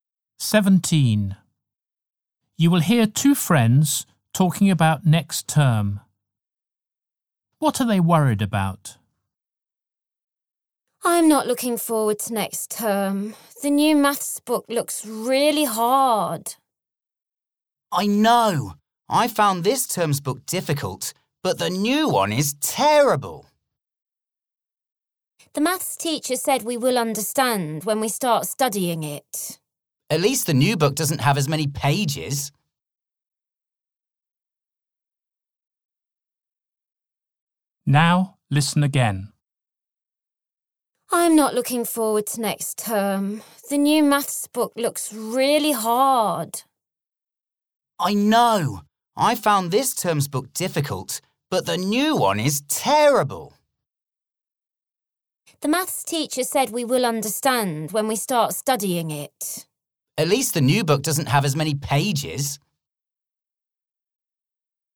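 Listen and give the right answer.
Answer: The new maths book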